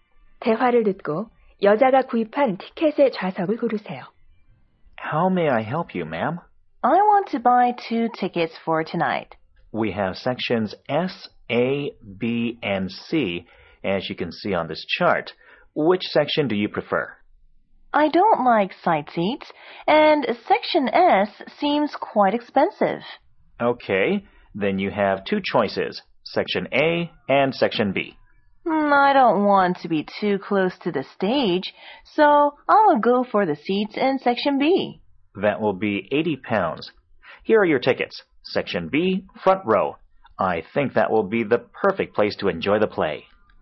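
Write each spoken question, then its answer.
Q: 대화를 듣고 여자가 구입한 티켓의 좌석을 고르세요.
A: B구역 맨 앞줄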